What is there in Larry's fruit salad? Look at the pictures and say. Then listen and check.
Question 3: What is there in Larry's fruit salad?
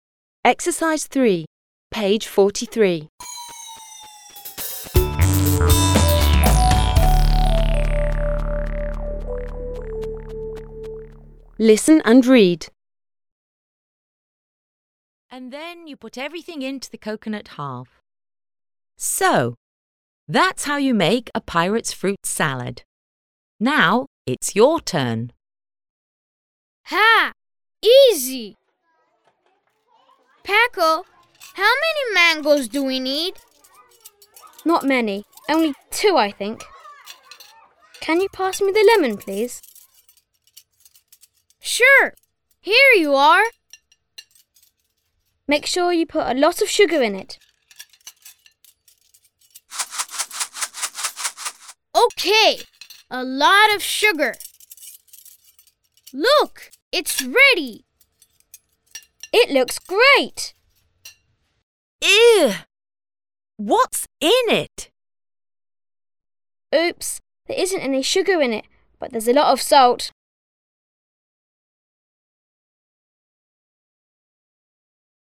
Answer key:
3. Larry has got two mangoes, a lemon and a lot of sugar in his fruit salad.

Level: 4 класс